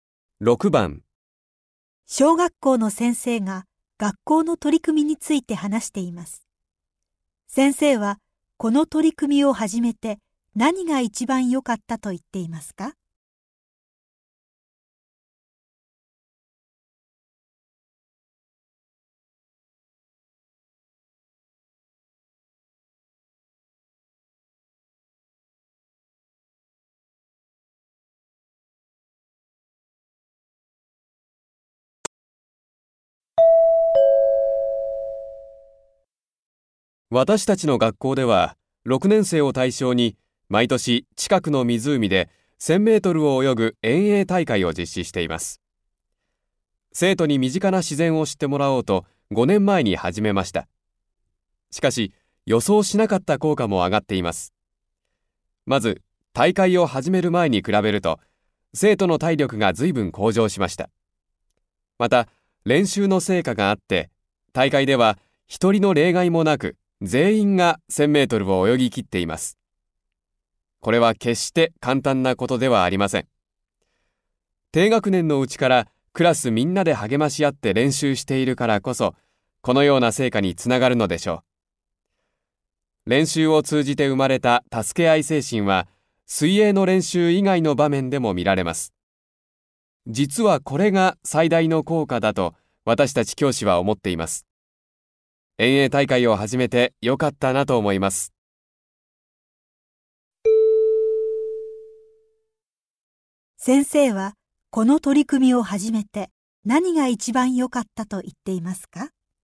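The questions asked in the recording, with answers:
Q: 先生はこの取り組みを始めて何が一番よかったと言っていますか?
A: 生徒に助け合いの精神が生まれたこと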